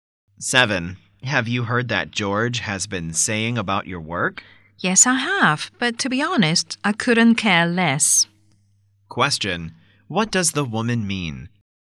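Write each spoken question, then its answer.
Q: What does the woman mean?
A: She doesn't care what George says about her work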